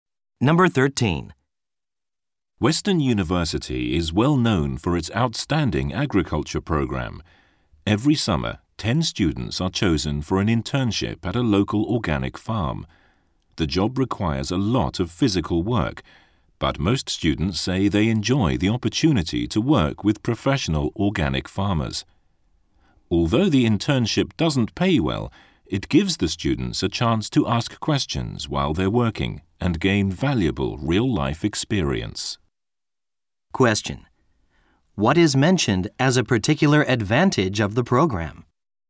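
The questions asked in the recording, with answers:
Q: What is mentioned as a particular advantage of the program?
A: Students can ask professional farmers questions while working and gain real-life experience.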